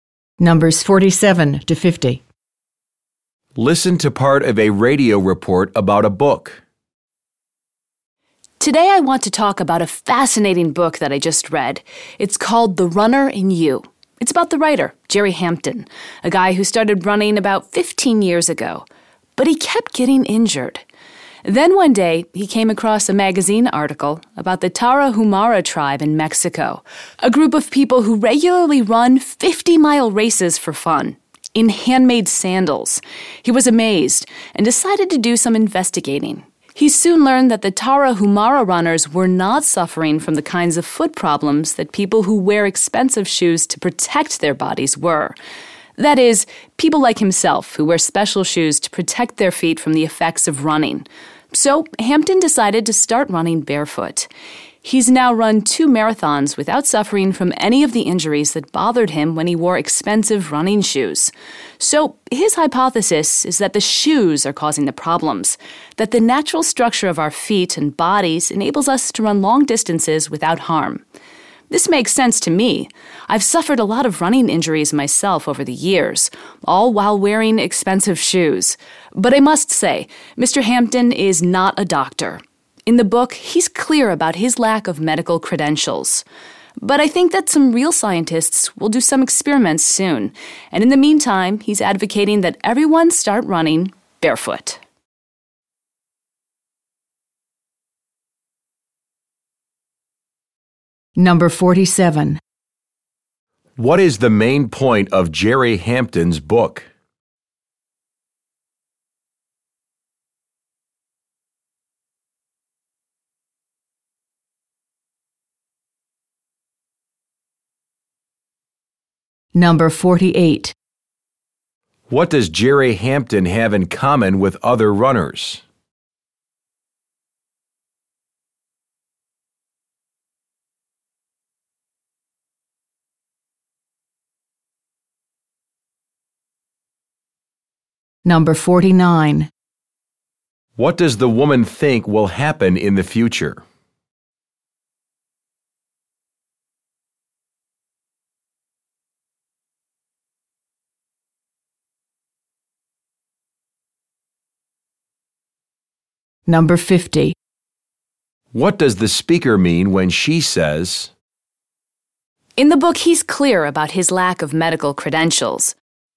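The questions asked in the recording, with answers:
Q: What is the main point of Jerry Hampton's book?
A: Running shoes cause injuries; running barefoot is better

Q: What does the woman think will happen in the future?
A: Scientists will do experiments on the idea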